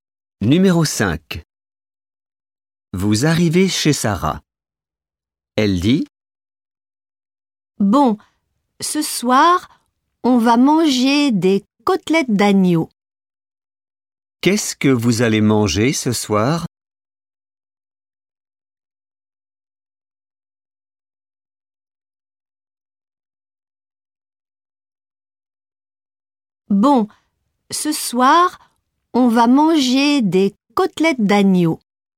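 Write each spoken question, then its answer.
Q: Qu'est-ce que vous allez manger ce soir?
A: des côtelettes d'agneau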